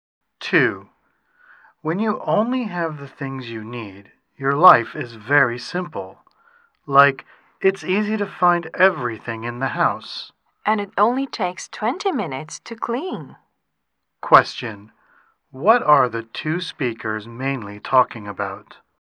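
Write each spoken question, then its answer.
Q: What are the two speakers mainly talking about?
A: Living a simple life with only the things you need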